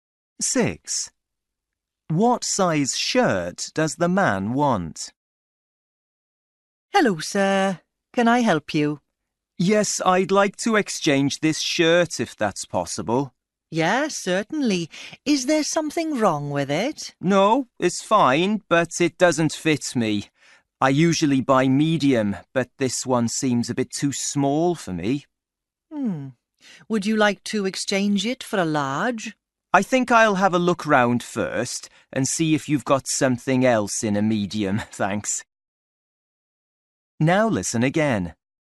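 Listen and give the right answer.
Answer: Medium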